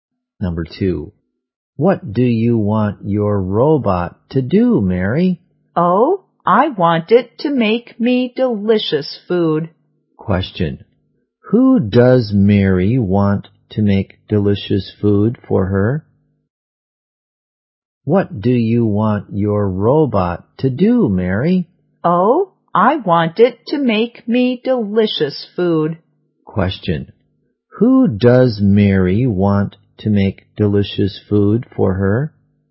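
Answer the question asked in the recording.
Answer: Her robot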